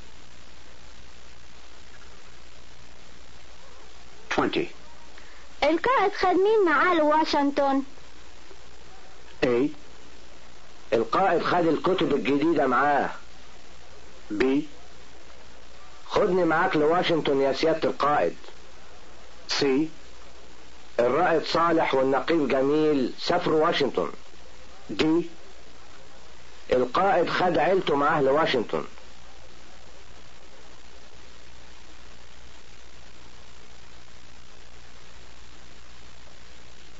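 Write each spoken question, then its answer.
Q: القائد خد مين معاه لواشنطن؟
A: D: القائد خد عيلته معاه لواشنطن.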